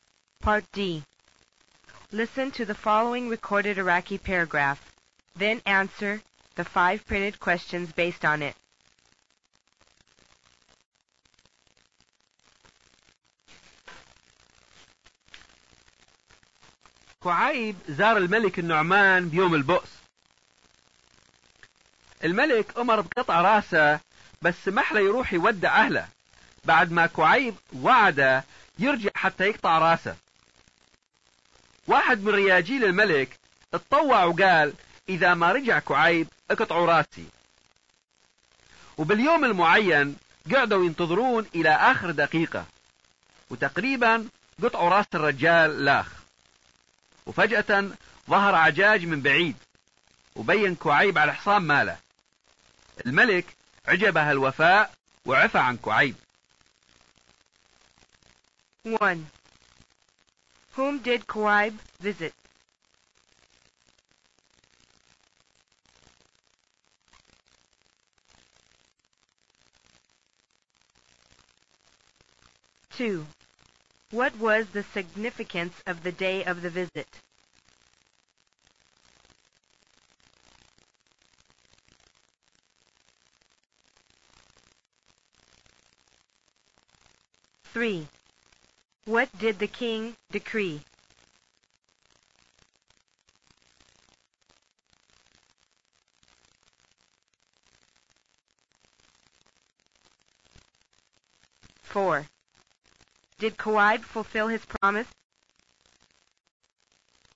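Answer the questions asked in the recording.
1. King al-Nu'man
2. It was the king's Day of Misery (Yawm al-Bu's)
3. That Kuaib's head be cut off
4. Yes, he came back at the last minute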